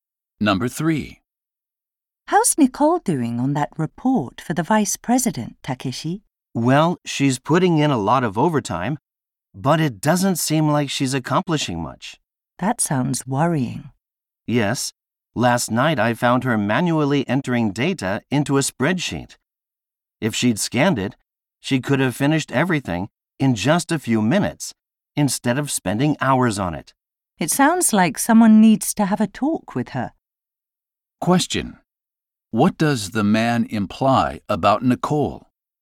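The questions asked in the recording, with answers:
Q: What does the man imply about Nicole?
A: She is working inefficiently.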